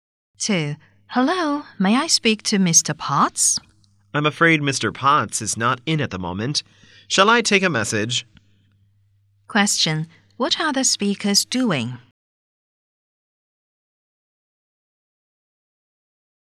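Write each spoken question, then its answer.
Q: What are the speakers doing?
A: Talking on the phone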